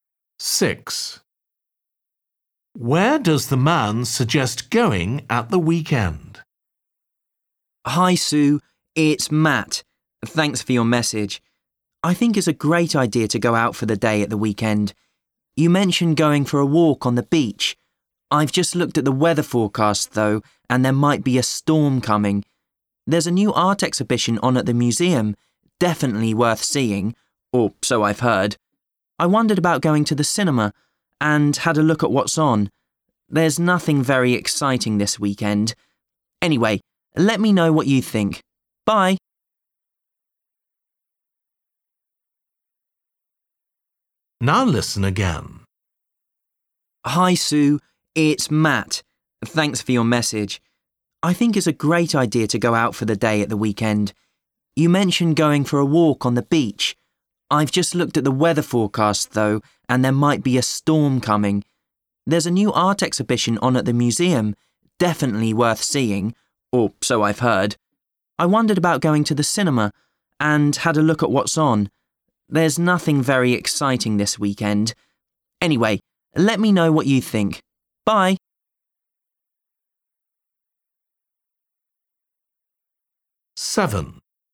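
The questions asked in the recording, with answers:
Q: Where does the man suggest going at the weekend?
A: To the museum (art exhibition)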